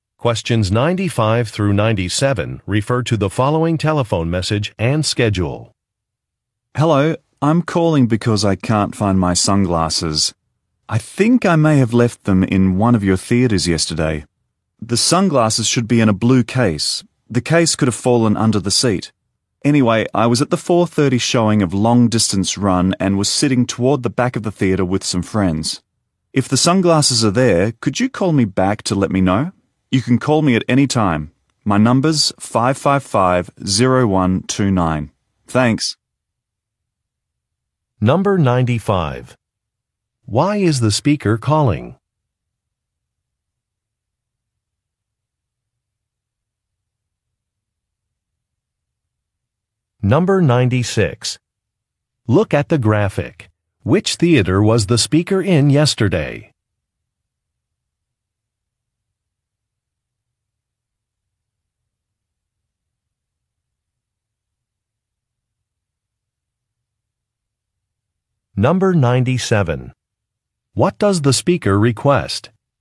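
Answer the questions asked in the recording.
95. To ask about sunglasses she lost in the theater
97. A call back if her sunglasses are found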